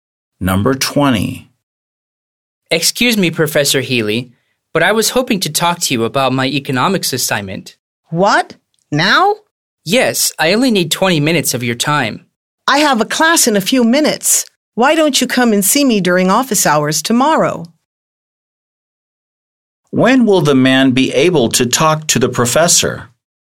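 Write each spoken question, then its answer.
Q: When will the man be able to talk to the professor?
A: Tomorrow during office hours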